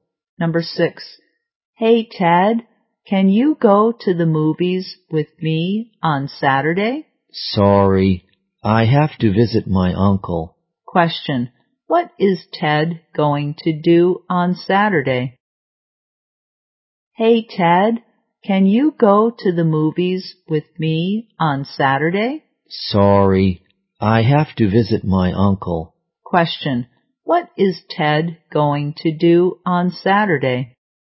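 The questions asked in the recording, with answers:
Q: What is Ted going to do on Saturday?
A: Visit his uncle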